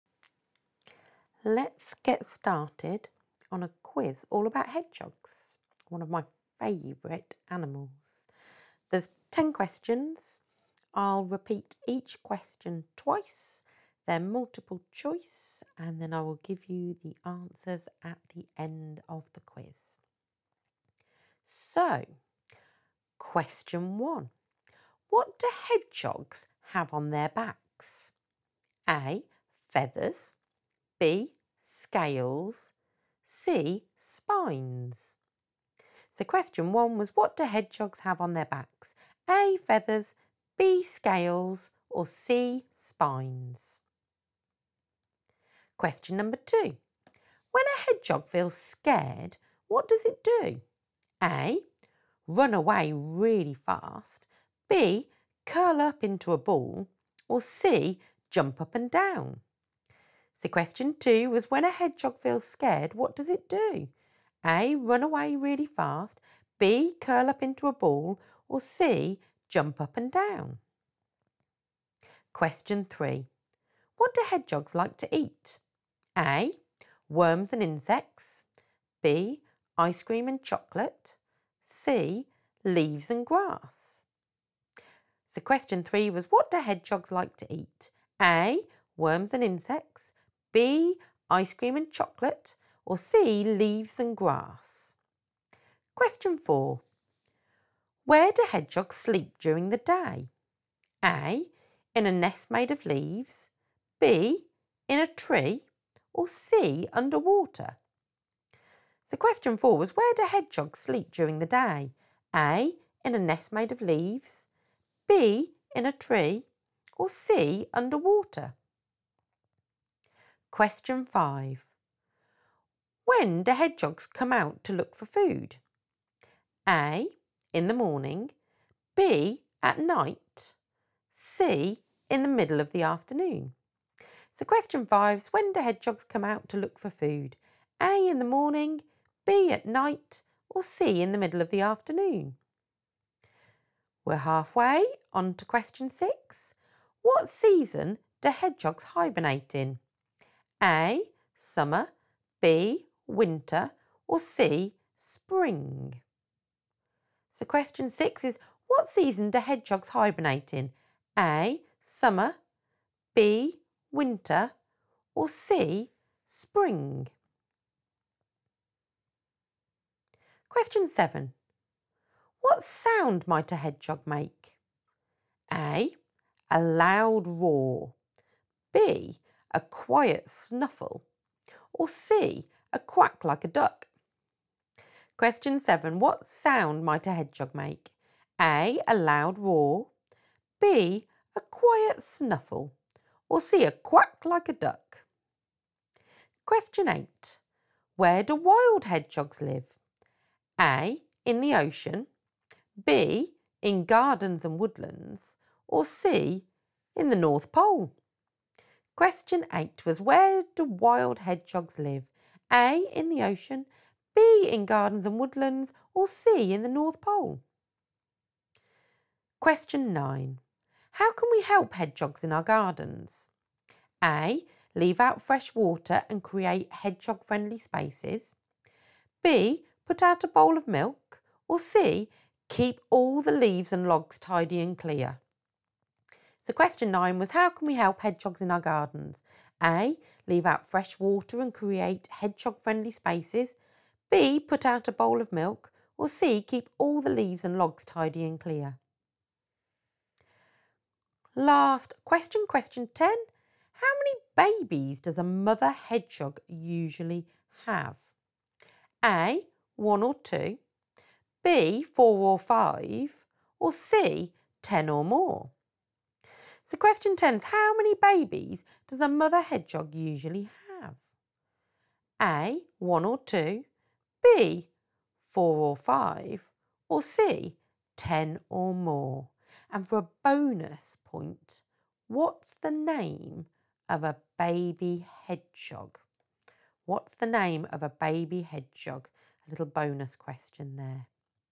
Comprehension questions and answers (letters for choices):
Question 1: What do hedgehogs have on their backs?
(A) Feathers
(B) Scales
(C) Spines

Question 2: When a hedgehog feels scared, what does it do?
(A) Run away really fast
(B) Curl up into a ball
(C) Jump up and down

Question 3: What do hedgehogs like to eat?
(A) Worms and insects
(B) Ice cream and chocolate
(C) Leaves and grass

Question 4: Where do hedgehogs sleep during the day?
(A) In a nest made of leaves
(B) In a tree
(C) Underwater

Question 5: When do hedgehogs come out to look for food?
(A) In the morning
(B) At night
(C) In the middle of the afternoon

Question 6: What season do hedgehogs hibernate in?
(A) Summer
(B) Winter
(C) Spring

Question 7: What sound might a hedgehog make?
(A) A loud roar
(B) A quiet snuffle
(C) A quack like a duck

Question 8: Where do wild hedgehogs live?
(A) In the ocean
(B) In gardens and woodlands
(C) In the North Pole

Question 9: How can we help hedgehogs in our gardens?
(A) Leave out fresh water and create hedgehog-friendly spaces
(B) Put out a bowl of milk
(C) Keep all the leaves and logs tidy and clear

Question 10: How many babies does a mother hedgehog usually have?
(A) 1 or 2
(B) 4 or 5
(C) 10 or more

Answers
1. C
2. B
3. A
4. A
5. B
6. B
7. B
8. B
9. A
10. B